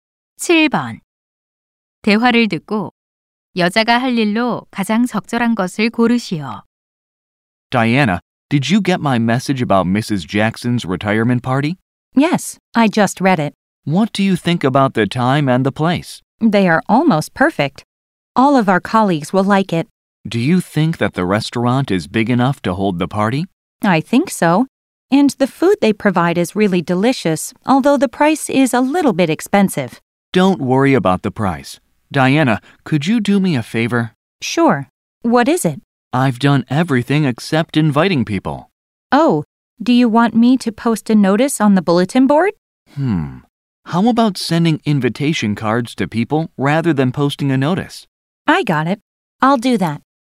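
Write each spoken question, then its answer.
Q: 대화를 듣고 여자가 할 일로 가장 적절한 것을 고르시오.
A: 초대장 보내기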